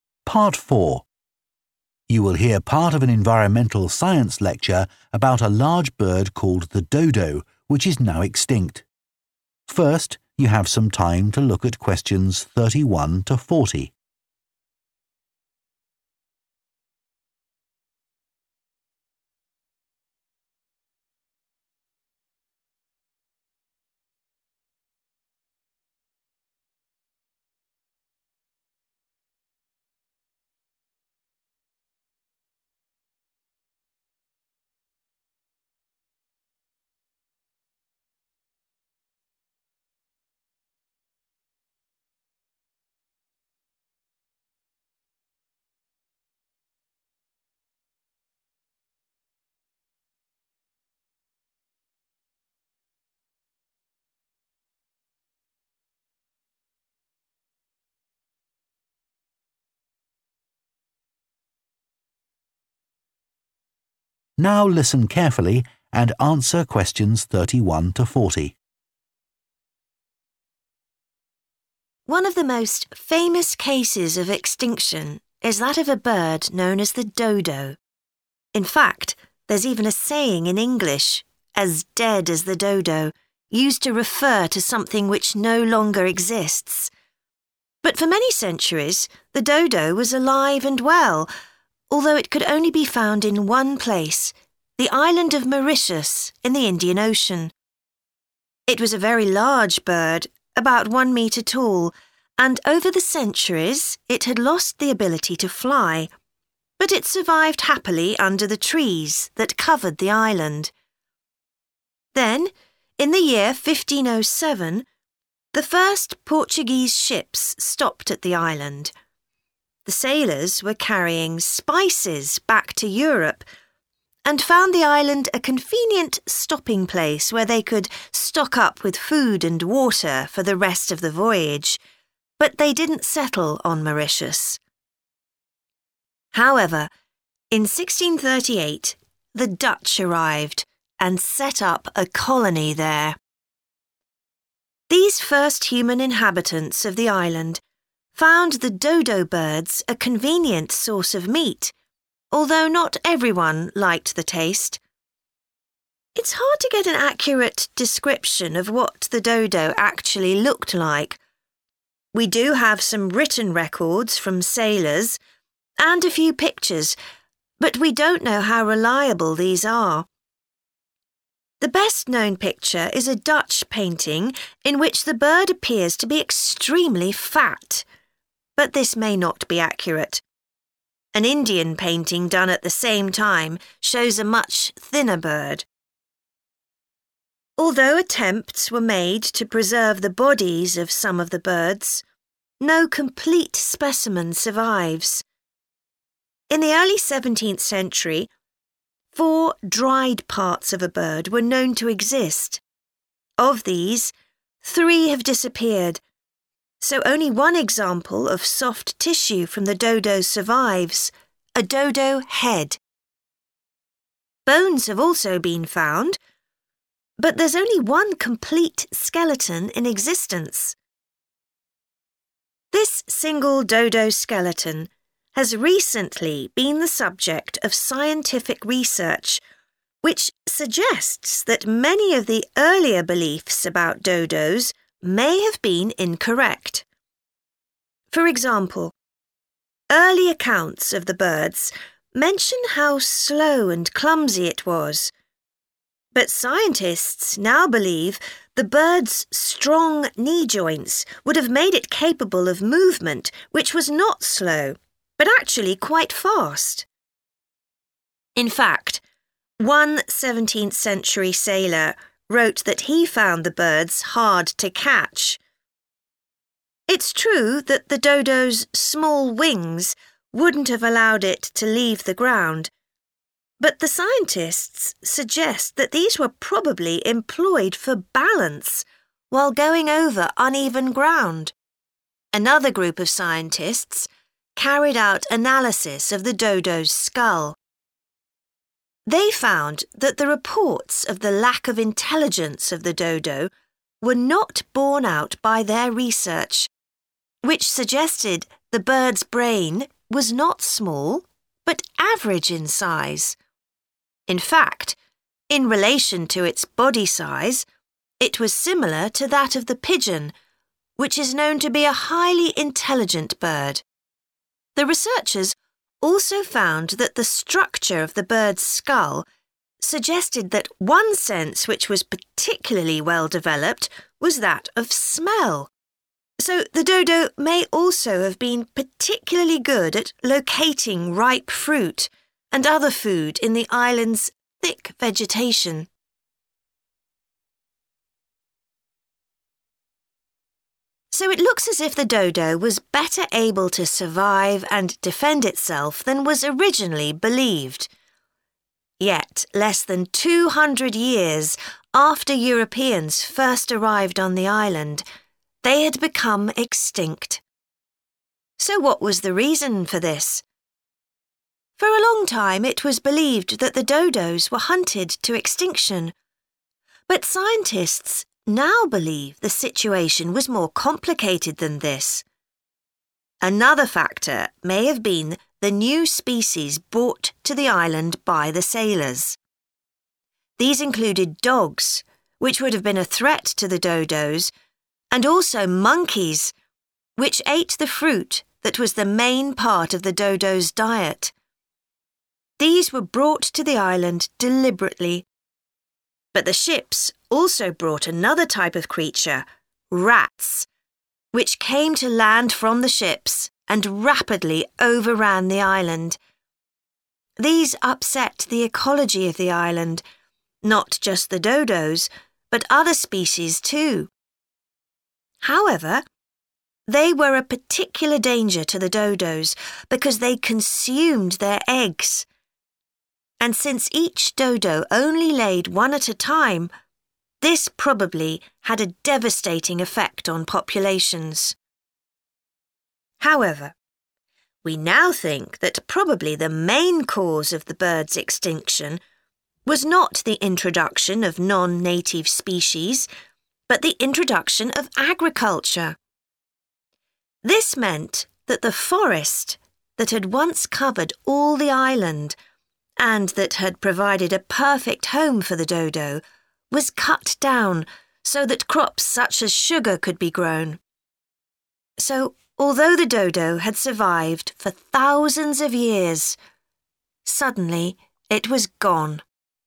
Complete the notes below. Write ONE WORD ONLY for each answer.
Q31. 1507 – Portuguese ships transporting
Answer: spice

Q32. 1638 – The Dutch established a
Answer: colony

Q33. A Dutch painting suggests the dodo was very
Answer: fat

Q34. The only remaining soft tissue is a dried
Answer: head

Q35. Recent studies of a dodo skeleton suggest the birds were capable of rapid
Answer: movement

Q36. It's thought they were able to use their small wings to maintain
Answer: balance

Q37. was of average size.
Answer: brain

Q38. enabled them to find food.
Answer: smell

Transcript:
One of the most famous cases of extinction is that of a bird known as the dodo. In fact there's even a saying in English, 'as dead as the dodo', used to refer to something which no longer exists. But for many centuries the dodo was alive and well, although it could only be found in one place, the island of Mauritius in the Indian Ocean. It was a very large bird, about one metre tall, and over the centuries it had lost the ability to fly, but it survived happily under the trees that covered the island.
Then in the year 1507 the first Portuguese ships stopped at the island. Các thủy thủ đang mang theo gia vị] (Question 31) back to Europe, and found the island a convenient stopping place where they could stock up with food and water for the rest of the voyage, but they didn't settle on Mauritius. These first human inhabitants of the island found the dodo birds a convenient source of meat, although not everyone liked the taste.
It's hard to get an accurate description of what the dodo actually looked like. We do have some written records from sailors, and a few pictures, but we don't know how reliable these are. The best-known picture is a Dutch painting in which the bird appears to be extremely fat [Bức tranh nổi tiếng nhất là bức tranh của Hà Lan, trong đó con chim có vẻ cực kỳ béo] (Question 33), but this may not be accurate – an Indian painting done at the same time shows a much thinner bird.
Although attempts were made to preserve the bodies of some of the birds, no complete specimen survives. In the early 17th century four dried parts of a bird were known to exist – of these, three have disappeared, so only one example of soft tissue from the dodo survives, a dodo head [vì vậy chỉ có một ví dụ về mô mềm của dodo còn tồn tại, đầu dodo] (Question 34). Bones have also been found, but there's only one complete skeleton in existence.
This single dodo skeleton has recently been the subject of scientific research [= studies] which suggests that many of the earlier beliefs about dodos may have been incorrect. For example, early accounts of the birds mention how slow and clumsy it was, but scientists now believe the bird's strong knee joints would have made it capable of movement which was not slow [= rapid] [Các khớp đầu gối chắc khỏe của con chim sẽ giúp nó có khả năng di chuyển không chậm] (Question 35), but actually quite fast. In fact, one 17th century sailor wrote that he found the birds hard to catch. Another group of scientists carried out an analysis of the dodo's skull. In fact, in relation to its body size, it was similar to that of the pigeon, which is known to be a highly intelligent bird. So the dodo may also have been particularly good at locating ripe fruit and other food [= find food] in the island's thick vegetation.
So it looks as if the dodo was better able to survive and defend itself than was originally believed. Yet less than 200 years after Europeans first arrived on the island, they had become extinct. So what was the reason for this? For a long time, it was believed that the dodos were hunted to extinction, but scientists now believe the situation was more complicated than this [= Hunting was probably not the main cause]. Another factor may have been the new species brought to the island by the sailors. These included dogs, which would have been a threat to the dodos, and also monkeys, which ate the fruit that was the main part of the dodos' diet. These upset the ecology of the island, not just the dodos but other species too. However, they were a particular danger to the dodos because they consumed their eggs [= ate the birds' eggs], and since each dodo only laid one at a time, this probably had a devastating effect on populations.
However, we now think that probably the main cause of the birds' extinction was not the introduction of non-native species, but the introduction of agriculture [= The arrival of farming].